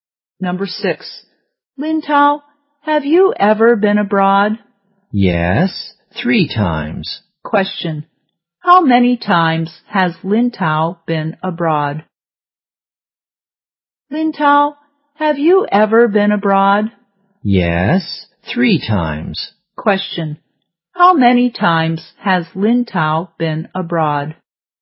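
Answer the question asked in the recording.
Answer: 3 times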